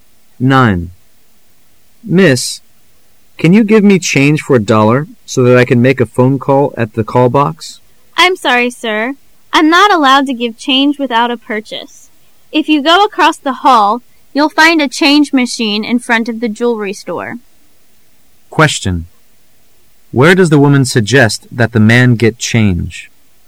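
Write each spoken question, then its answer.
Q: Where does the woman suggest that the man get change?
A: At the change machine in front of the jewelry store across the hall

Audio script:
[解析] M: Miss, can you give me change for a dollar so that I can make a phone call at the call box? W: I' m sorry, sir. I' m not allowed to give change without a purchase. If you go across the hall, you' 11 find a change machine in front of the jewelry store. Q: Where does the woman suggest that the man get change?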